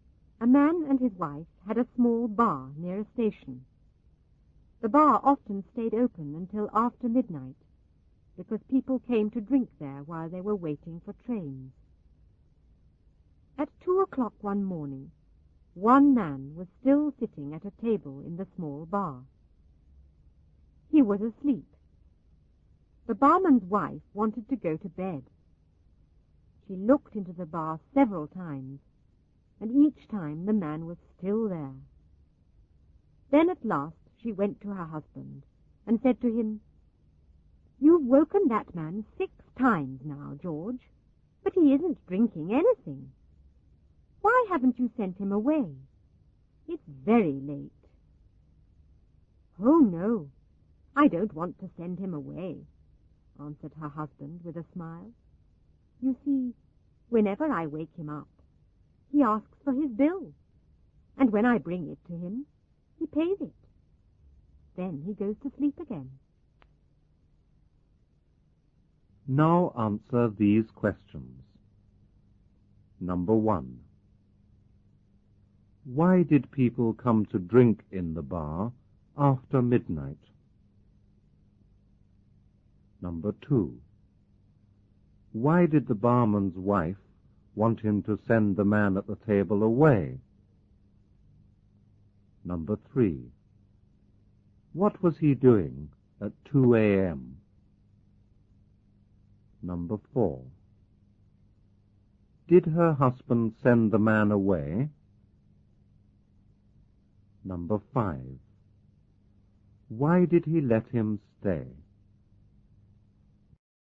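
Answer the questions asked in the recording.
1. Because they were waiting for trains.
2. Because it was very late and she wanted to go to bed.
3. He was sitting at a table in the bar, asleep.
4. No.
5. Because every time he woke him, the man asked for his bill and paid it.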